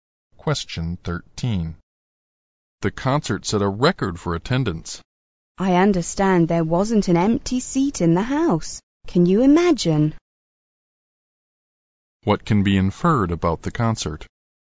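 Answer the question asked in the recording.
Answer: It was sold out, with a record attendance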